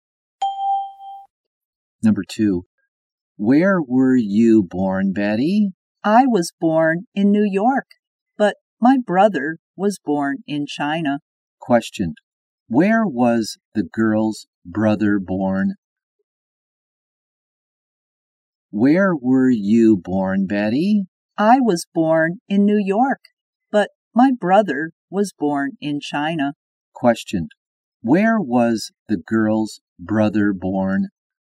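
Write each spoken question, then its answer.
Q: Where was the girl's brother born?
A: In China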